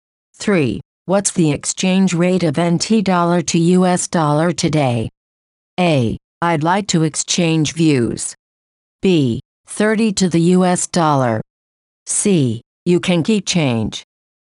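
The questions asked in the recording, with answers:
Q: What's the exchange rate of NT dollar to US dollar today?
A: B: 30 to the US dollar.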